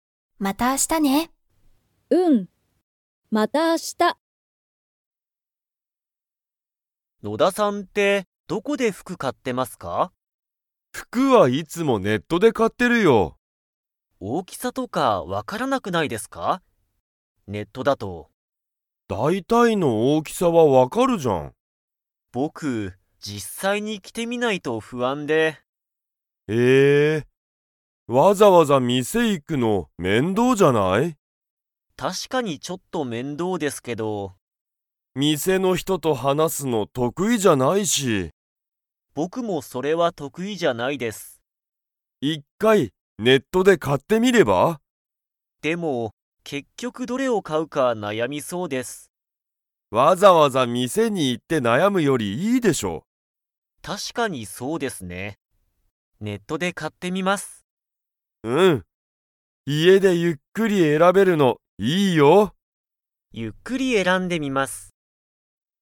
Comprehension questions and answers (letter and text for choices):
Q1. 野田のださんはどこで服ふくを買かっていますか?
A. ネット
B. 店みせ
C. テレビ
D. ラジオ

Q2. 藤本ふじもとさんは、店みせの人ひとと話はなすのが 。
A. 得意とくいだ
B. 得意とくいじゃない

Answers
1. A. ネット
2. B. 得意とくいじゃない

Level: Level 4